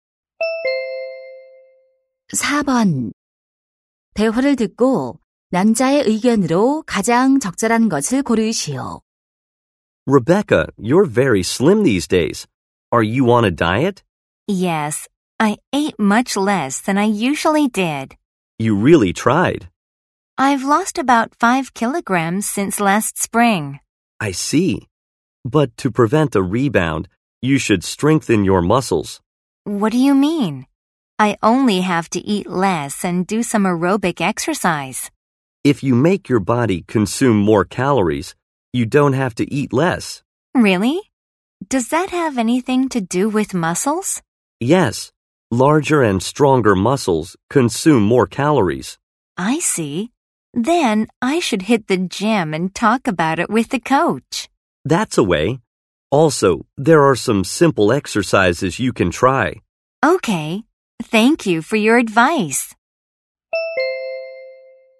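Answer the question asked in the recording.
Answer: 요요를 막으려면 근육을 강화해야 한다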